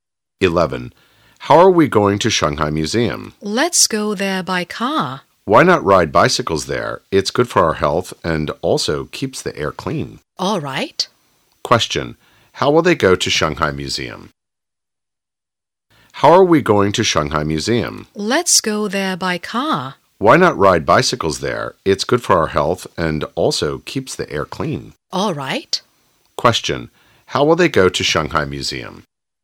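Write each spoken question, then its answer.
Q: How will they go to Shanghai Museum?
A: By bicycle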